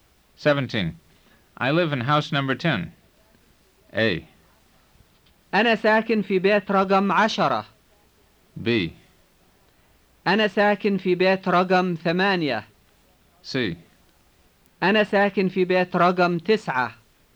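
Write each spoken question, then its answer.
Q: I live in house number 10.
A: A: أنا ساكن في بيت رقم 10.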